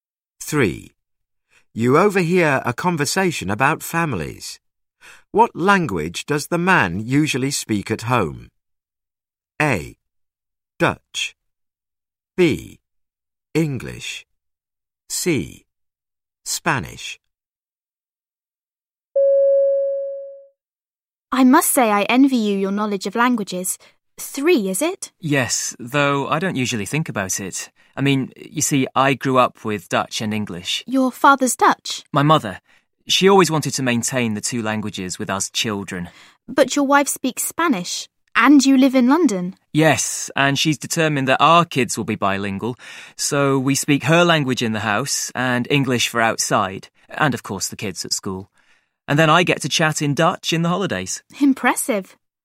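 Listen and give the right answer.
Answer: C: Spanish.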